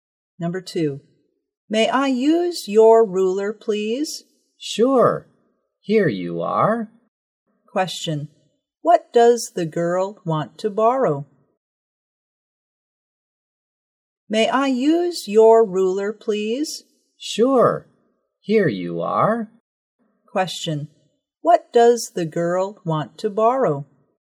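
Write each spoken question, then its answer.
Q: Question. What does the girl want to borrow?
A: A ruler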